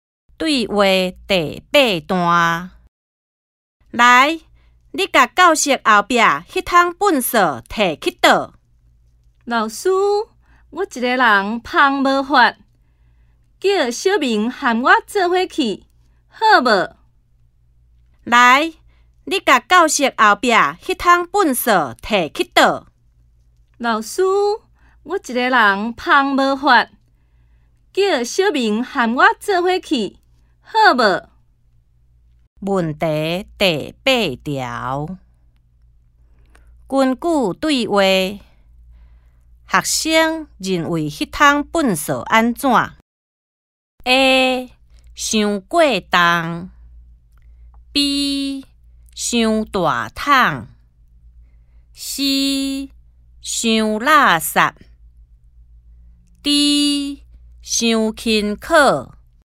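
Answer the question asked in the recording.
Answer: A: 伤过重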